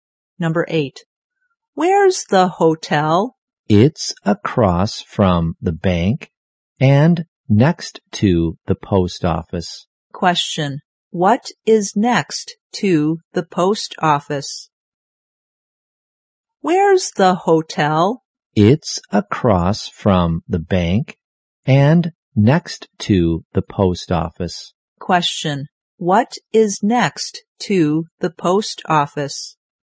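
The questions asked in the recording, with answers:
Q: Question, what is next to the post office?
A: The hotel.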